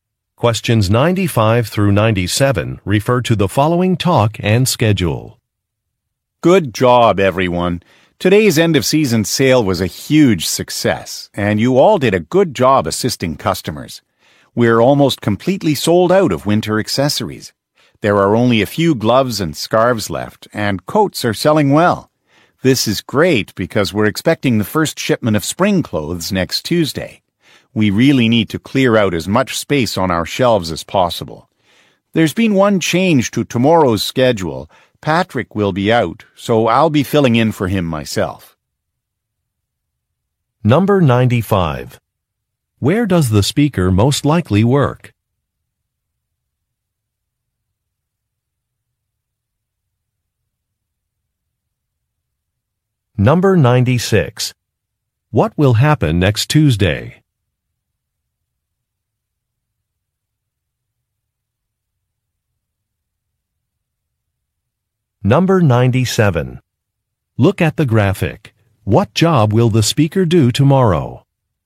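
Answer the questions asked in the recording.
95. At a clothing store
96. A shipment of spring clothes will arrive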